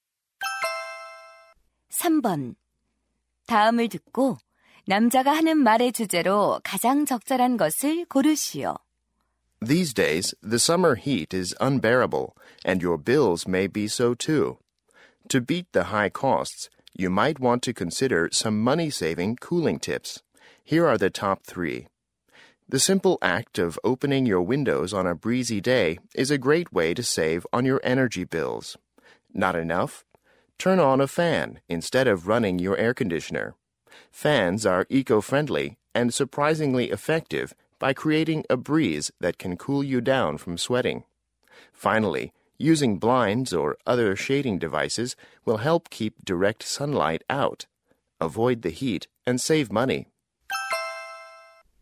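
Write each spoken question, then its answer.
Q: 다음을 듣고 남자가 하는 말의 주제로 가장 적절한 것을 고르시오.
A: 여름철 냉방비를 절약하는 방법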